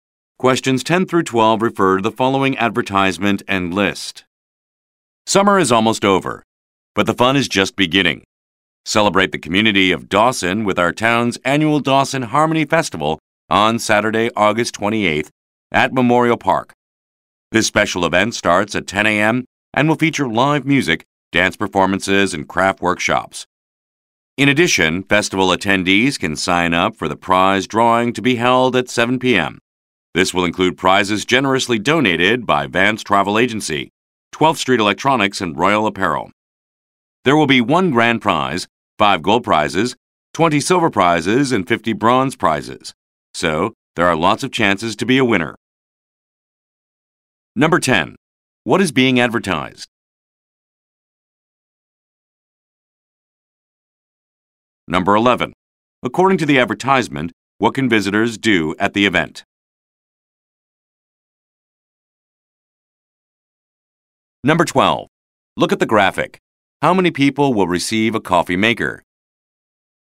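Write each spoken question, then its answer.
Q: What is being advertised?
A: The annual Dawson Harmony Festival, a community festival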